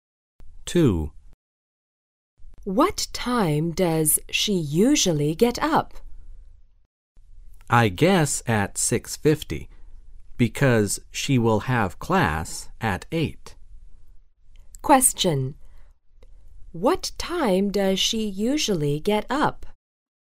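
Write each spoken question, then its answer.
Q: What time does she usually get up?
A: At 6:50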